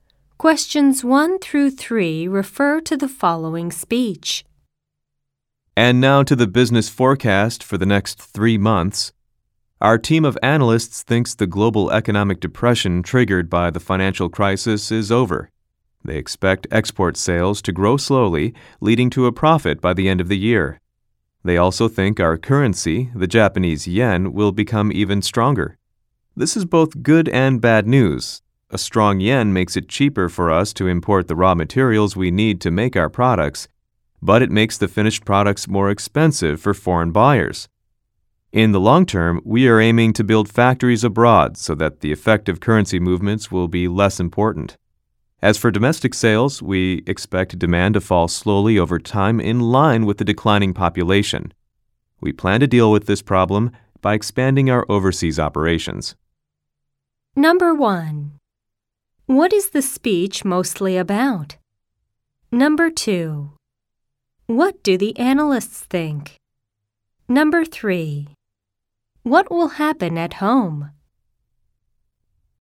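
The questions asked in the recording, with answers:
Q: What is the speech mostly about?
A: The company's business forecast for the next 3 months

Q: What will happen at home?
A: Domestic demand will fall slowly because the population is declining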